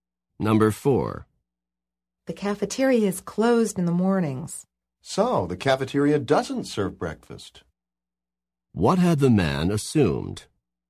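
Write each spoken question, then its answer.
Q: What had the man assumed?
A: That the cafeteria served breakfast.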